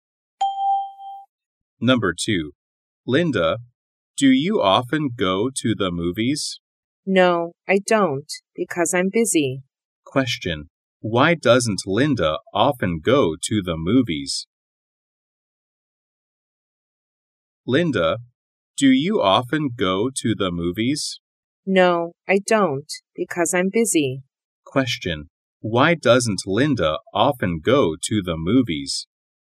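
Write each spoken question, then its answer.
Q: Why doesn't Linda often go to the movies?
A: Because she's busy.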